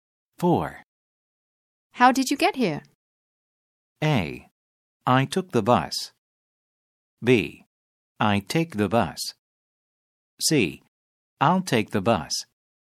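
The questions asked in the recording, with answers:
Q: How did you get here?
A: A: I took the bus.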